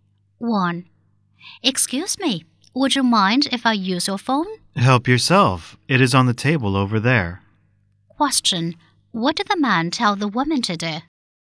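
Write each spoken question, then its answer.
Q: What did the man tell the woman to do?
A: Use the phone on the table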